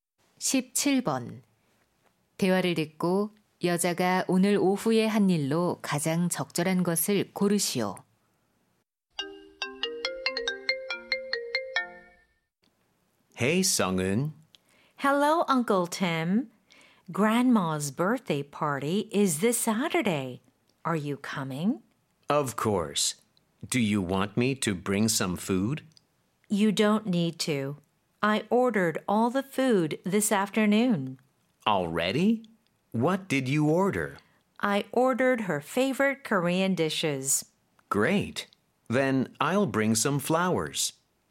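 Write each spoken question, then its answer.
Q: 대화를 듣고 여자가 오늘 오후에 한 일로 가장 적절한 것을 고르시오.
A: 생일 파티 음식 주문하기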